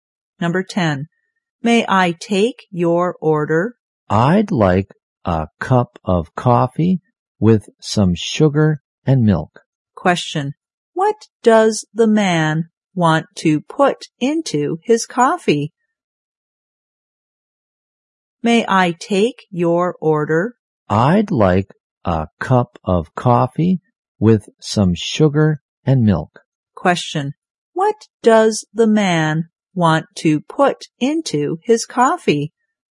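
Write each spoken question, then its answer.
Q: What does the man want to put into his coffee?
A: Sugar and milk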